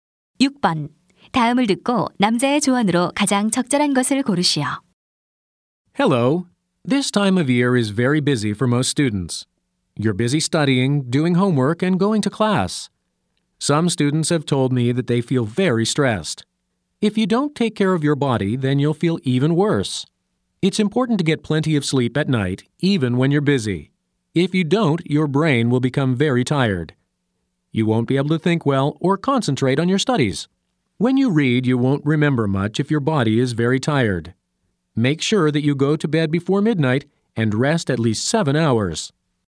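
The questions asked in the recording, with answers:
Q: 다음을 듣고 남자의 조언으로 가장 적절한 것을 고르시오.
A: 밤에 충분히 잠을 자라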